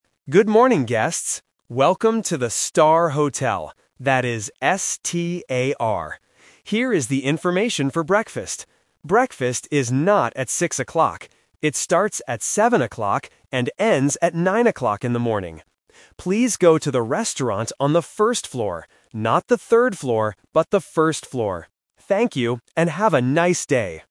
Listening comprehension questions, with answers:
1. How do you spell the name of the hotel?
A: S-T-A-R

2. What time does breakfast start?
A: At 7 o'clock

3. Where is the restaurant?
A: On the first floor

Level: A1